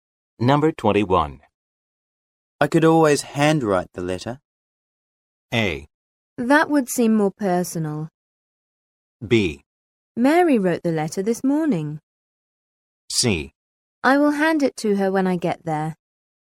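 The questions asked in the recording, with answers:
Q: I could always handwrite the letter.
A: A: That would seem more personal.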